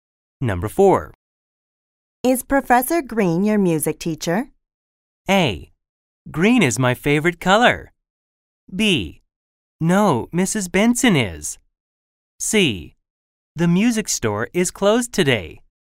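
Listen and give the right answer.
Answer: B: No, Mrs. Benson is.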